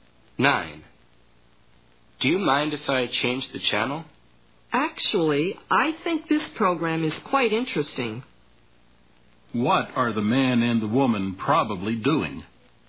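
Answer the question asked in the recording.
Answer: Watching TV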